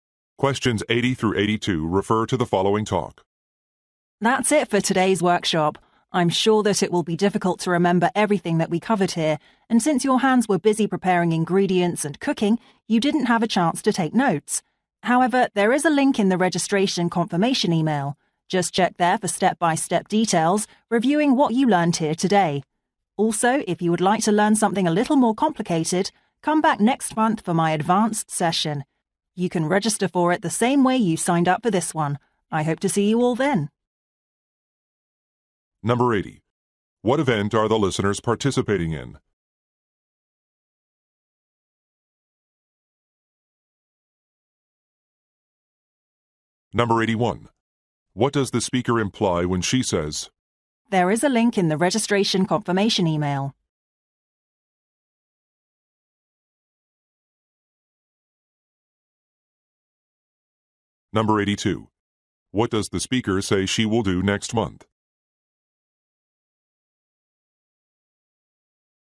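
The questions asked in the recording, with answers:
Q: What event are the listeners participating in?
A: A cooking workshop

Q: What does the speaker say she will do next month?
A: Lead an advanced session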